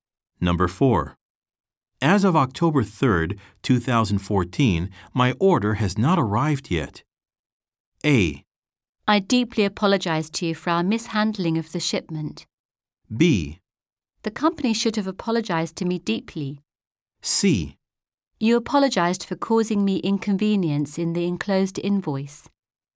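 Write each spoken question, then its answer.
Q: As of October 3rd, 2014, my order has not arrived yet.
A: A: I deeply apologize to you for our mishandling of the shipment.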